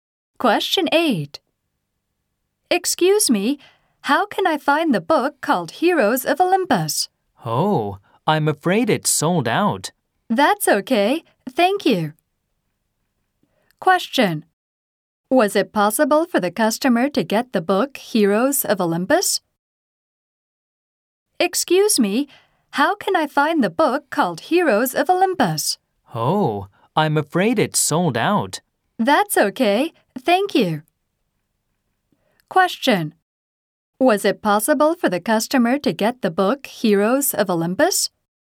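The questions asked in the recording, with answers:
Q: Was it possible for the customer to get the book Heroes of Olympus?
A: No, it was sold out.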